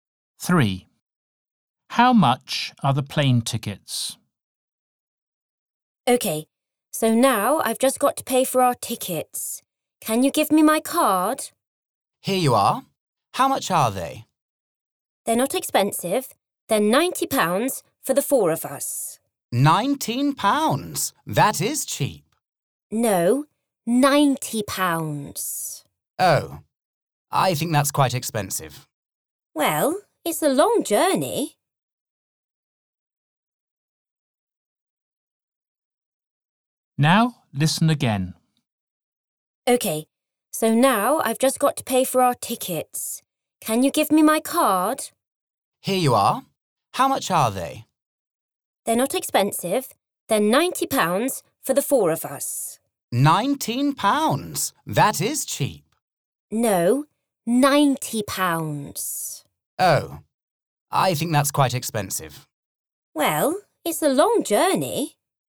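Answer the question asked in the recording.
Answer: £90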